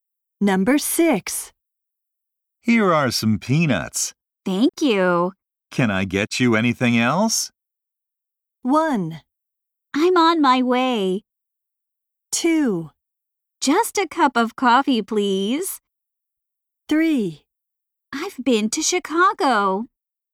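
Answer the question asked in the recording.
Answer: 2: Just a cup of coffee, please.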